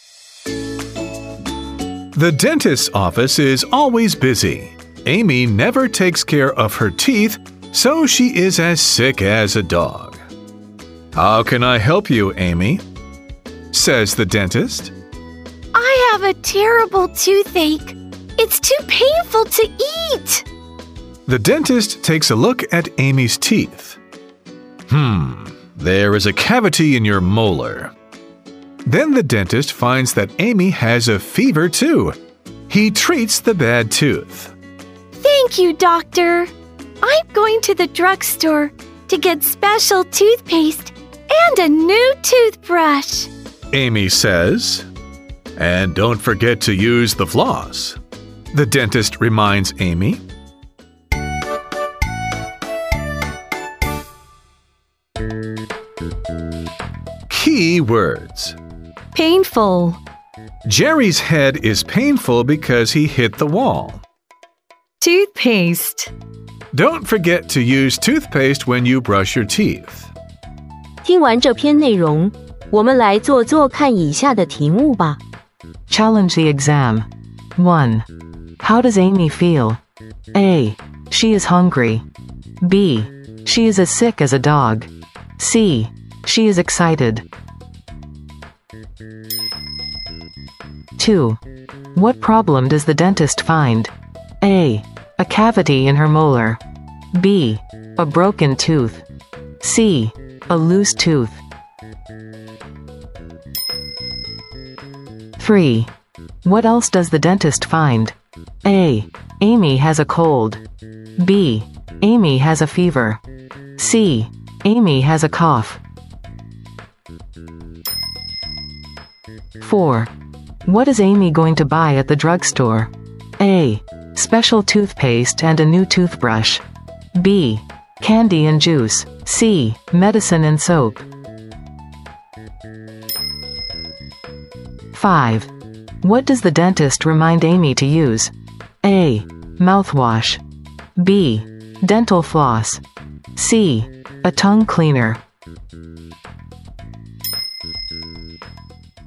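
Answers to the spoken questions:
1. B: She is as sick as a dog.
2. A: A cavity in her molar.
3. B: Amy has a fever.
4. A: Special toothpaste and a new toothbrush.
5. B: Dental floss.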